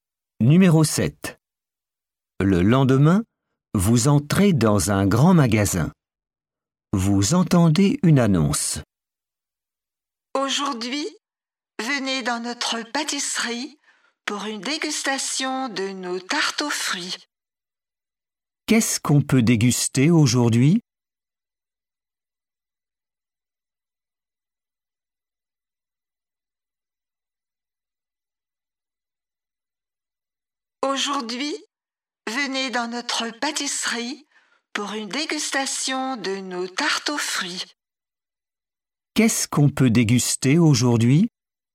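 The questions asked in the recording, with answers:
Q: Qu'est-ce qu'on peut déguster aujourd'hui?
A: Des tartes aux fruits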